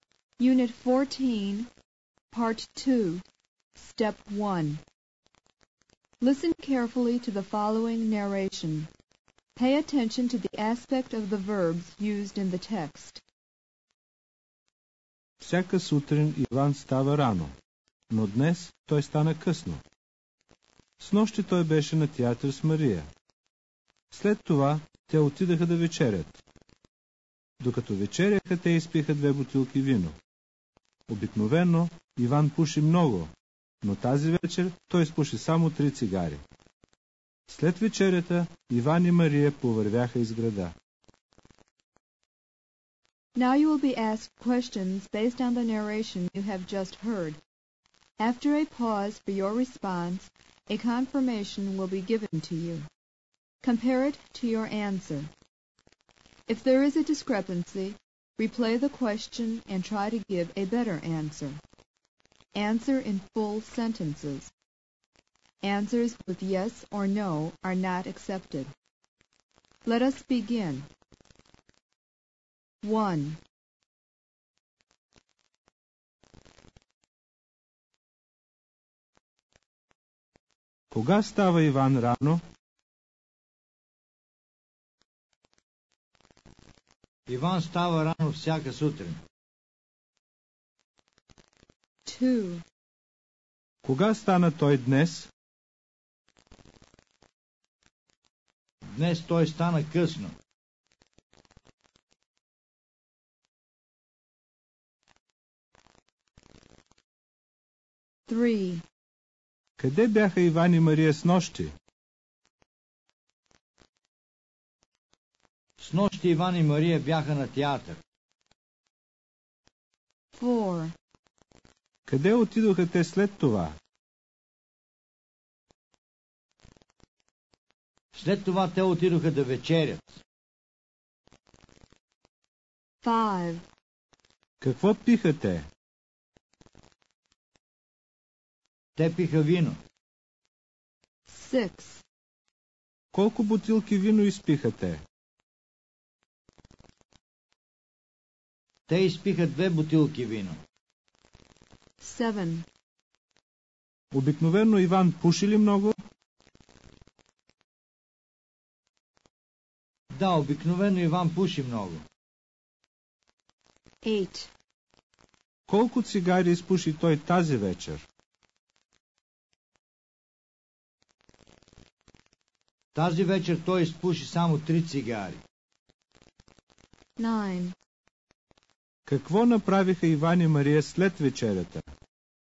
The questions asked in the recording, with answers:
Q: Кога става Иван рано?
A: Иван става рано всяка сутрин.

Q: Кога стана той днес?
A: Днес той стана късно.

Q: Къде бяха Иван и Мария снощи?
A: Снощи Иван и Мария бяха на театър.

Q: Къде отидоха те след това?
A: След това те отидоха да вечерят.

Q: Какво пиха те?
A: Те пиха вино.

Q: Колко бутилки вино изпиха те?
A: Те изпиха две бутилки вино.

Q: Обикновено Иван пуши ли много?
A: Да, обикновено Иван пуши много.

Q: Какво направиха Иван и Мария след вечерята?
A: След вечерята Иван и Мария повървяха из града.